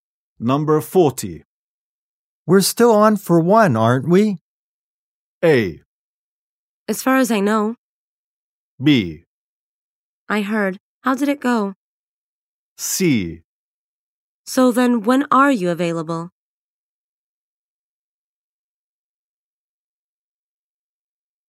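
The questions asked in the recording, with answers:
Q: We're still on for one, aren't we?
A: A: As far as I know.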